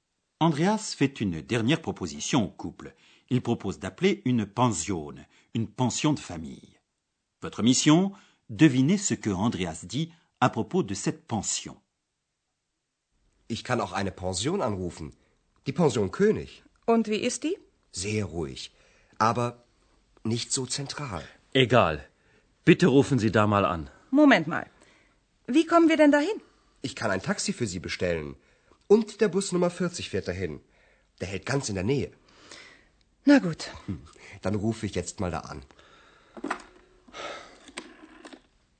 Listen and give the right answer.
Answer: Andreas dit à propos de la pension qu'elle est certes très calme, mais qu'elle n'est pas située au centre.